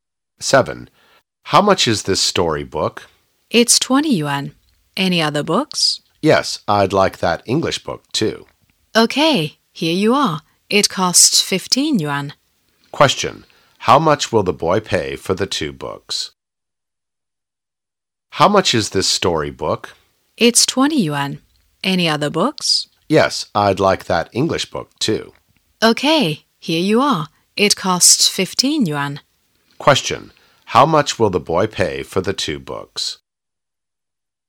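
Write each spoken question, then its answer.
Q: How much will the boy pay for the two books?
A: 35 yuan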